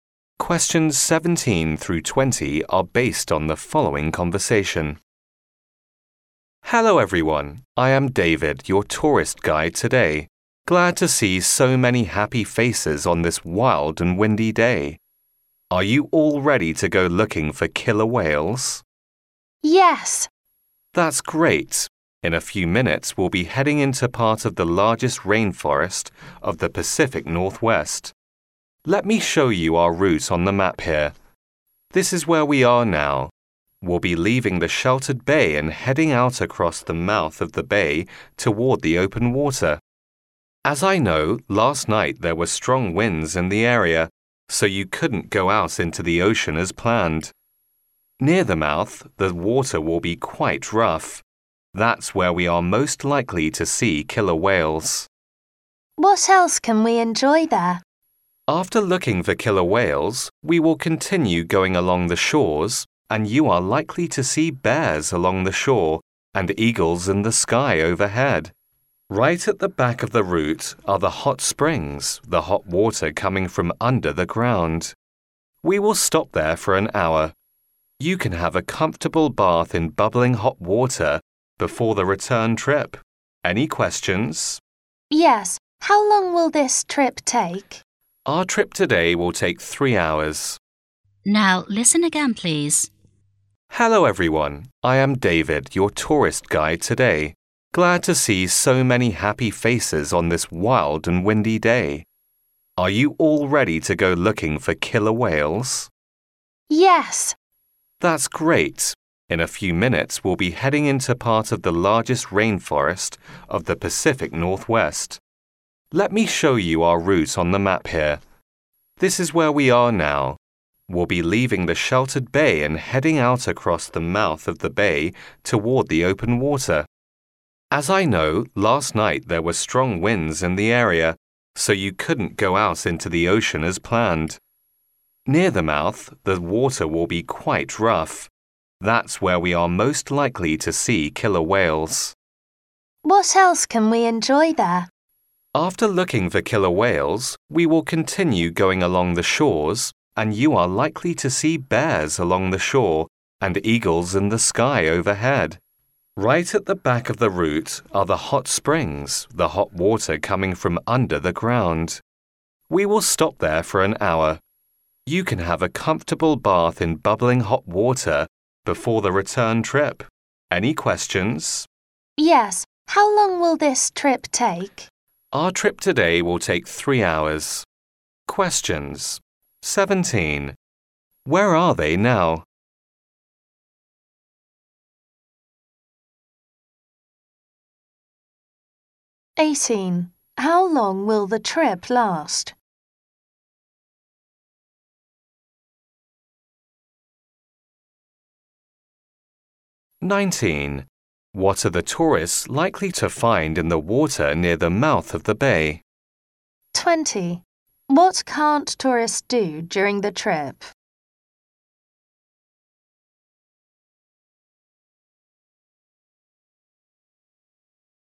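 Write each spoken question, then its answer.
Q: How long will the trip last?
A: 3 hours

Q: What are the tourists likely to find in the water near the mouth of the bay?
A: Killer whales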